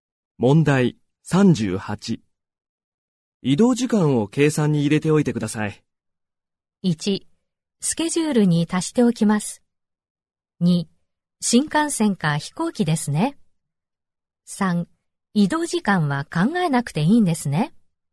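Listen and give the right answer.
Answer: 1: スケジュールに足しておきます。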